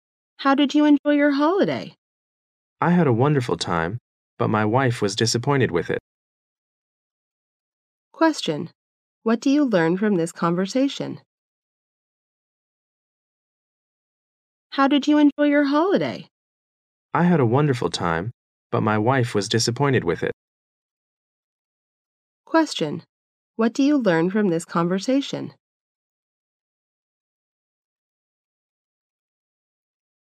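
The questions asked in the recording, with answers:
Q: What do you learn from this conversation?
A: The man enjoyed the holiday but his wife didn't.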